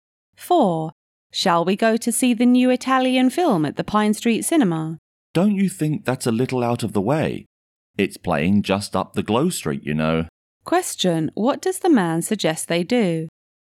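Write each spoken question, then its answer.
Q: What does the man suggest they do?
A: See the film at the cinema on Glow Street, which is closer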